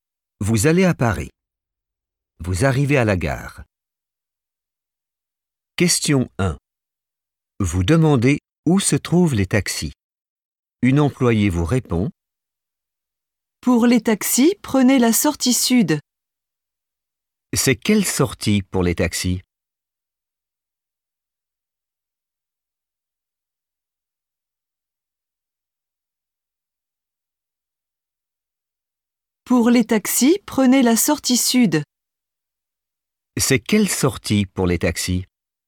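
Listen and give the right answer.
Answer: la sortie sud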